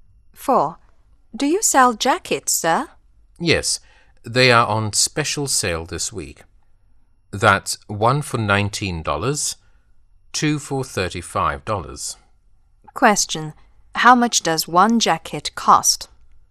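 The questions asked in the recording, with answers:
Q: How much does one jacket cost?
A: $19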